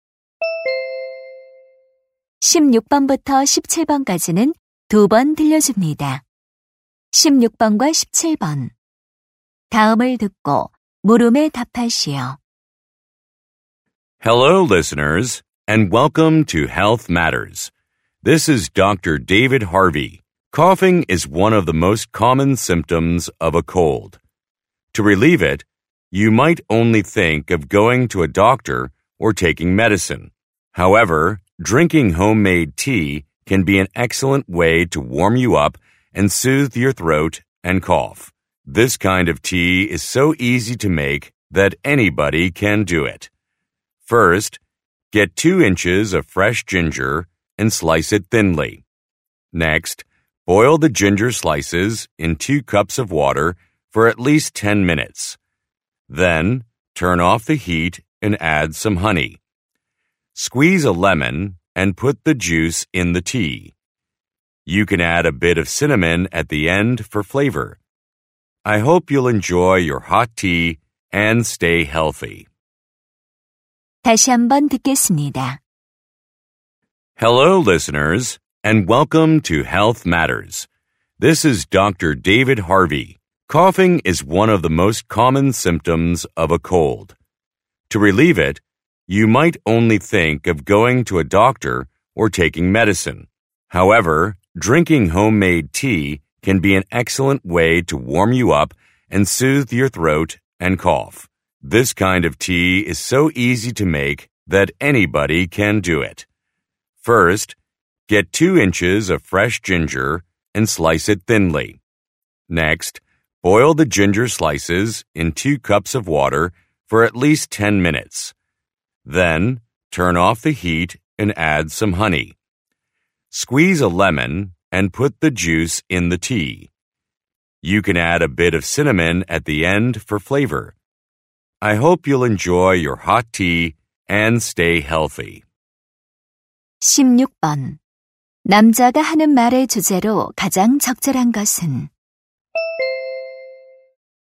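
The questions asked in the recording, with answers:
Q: 남자가 하는 말의 주제로 가장 적절한 것은?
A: 기침 완화를 위한 집에서 만드는 차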